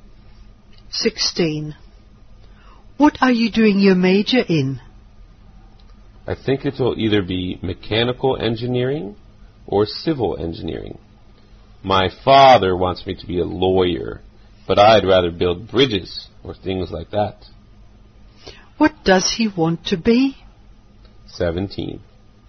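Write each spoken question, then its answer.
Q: What does he want to be?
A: An engineer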